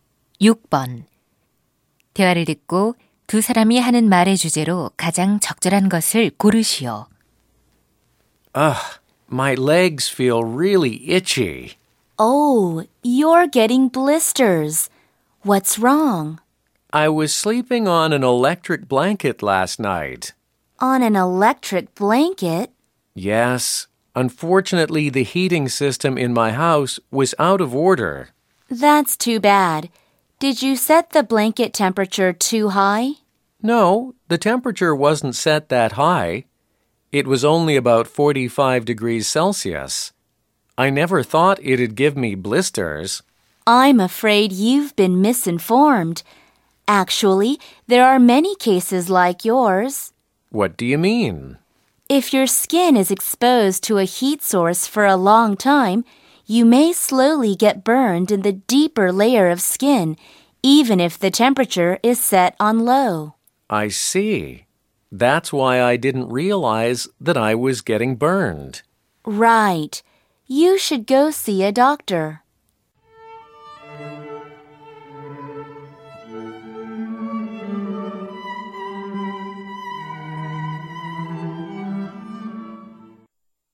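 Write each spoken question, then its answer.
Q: 대화를 듣고 두 사람이 하는 말의 주제로 가장 적절한 것을 고르시오.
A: 전기담요 사용 시 저온 화상의 위험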